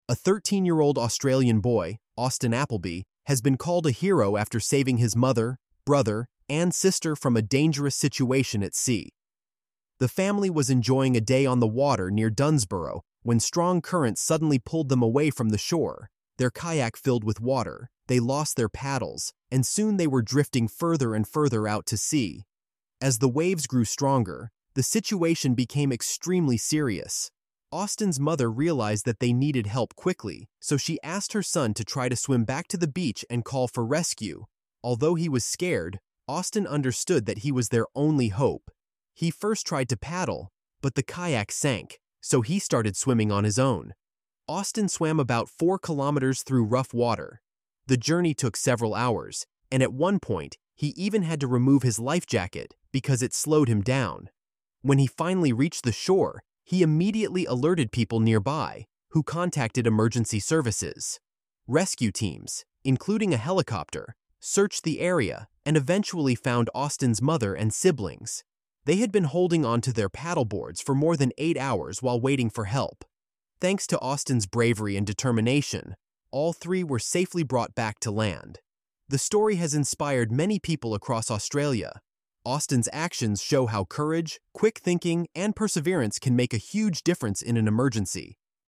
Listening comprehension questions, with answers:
Decide if the statements are true or false!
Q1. Austin's family was enjoying a day at the beach when the incident occurred.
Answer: False

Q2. Austin swam back to the shore to get help for his family.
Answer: True

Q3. The kayak sank because it was filled with water and lost its paddles.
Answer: True

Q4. Austin swam for a short distance before reaching the shore.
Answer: False

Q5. The rescue teams included a helicopter that helped find Austin's family.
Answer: True

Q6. Austin's mother and siblings waited for help for less than eight hours.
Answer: False

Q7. Austin's bravery inspired many people in Australia.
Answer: True

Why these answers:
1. The family was on the water, not at the beach.
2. Austin swam back to the shore to call for rescue.
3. The kayak sank after filling with water and losing its paddles.
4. Austin swam about four kilometers, which is a long distance.
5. The rescue teams included a helicopter that searched for the family.
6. They waited for more than eight hours for help.
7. Austin's actions inspired many people across Australia.

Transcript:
A 13-year-old Australian boy, Austin Applebee, has been called a hero after saving his mother, brother, and sister from a dangerous situation at sea. The family was enjoying a day on the water near Dunsborough when strong currents suddenly pulled them away from the shore. Their kayak filled with water, they lost their paddles, and soon they were drifting further and further out to sea.
As the waves grew stronger, the situation became extremely serious. Austin's mother realised that they needed help quickly, so she asked her son to try to swim back to the beach and call for rescue. Although he was scared, Austin understood that he was their only hope. He first tried to paddle, but the kayak sank, so he started swimming on his own.
Austin swam about four kilometres through rough water. The journey took several hours, and at one point he even had to remove his life jacket because it slowed him down. When he finally reached the shore, he immediately alerted people nearby, who contacted emergency services.
Rescue teams, including a helicopter, searched the area and eventually found Austin's mother and siblings. They had been holding onto their paddle boards for more than eight hours while waiting for help. Thanks to Austin's bravery and determination, all three were safely brought back to land.
The story has inspired many people across Australia. Austin's actions show how courage, quick thinking, and perseverance can make a huge difference in an emergency.